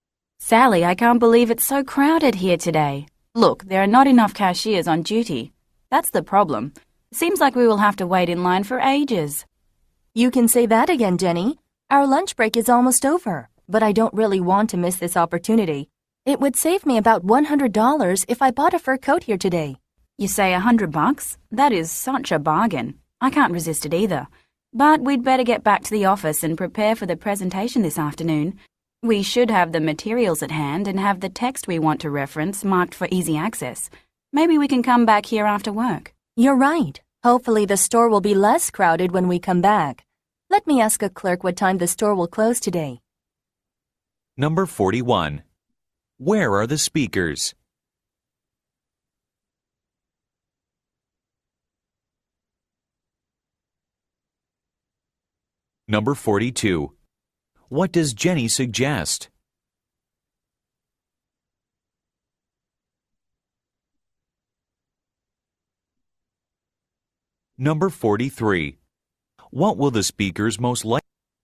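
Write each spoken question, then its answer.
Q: Where are the speakers?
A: In a store, where fur coats are on sale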